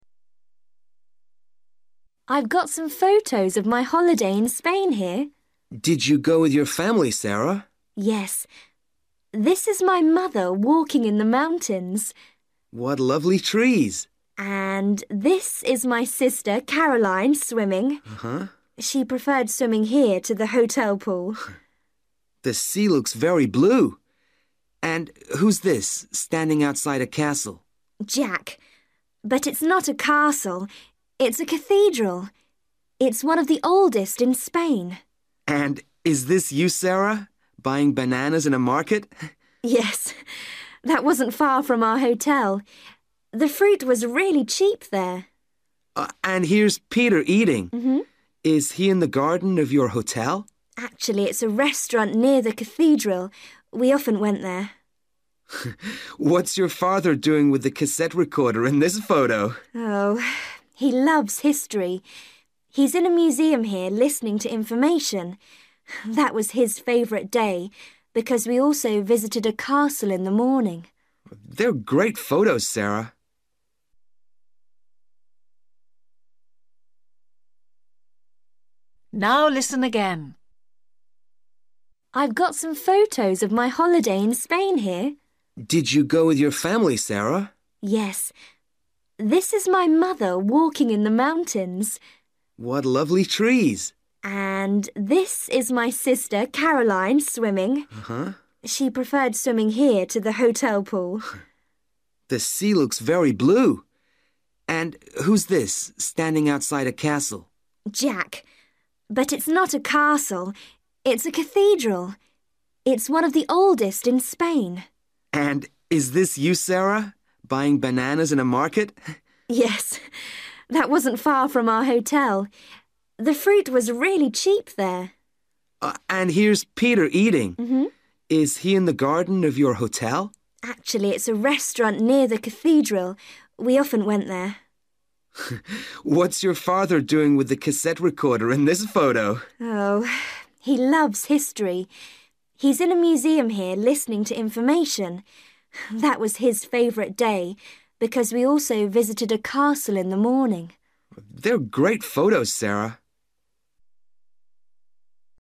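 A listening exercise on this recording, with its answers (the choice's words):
For each question, choose the correct answer. Listen to Sarah talking to a friend about her holiday photographs. What place is each person in?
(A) castle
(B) cathedral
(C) hotel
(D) market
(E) mountains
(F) museum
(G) restaurant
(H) sea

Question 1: Caroline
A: sea

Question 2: Jack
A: cathedral

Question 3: Sarah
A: market

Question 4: Peter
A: restaurant

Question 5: Sarah's father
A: museum

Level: Luyện nghe trình độ A2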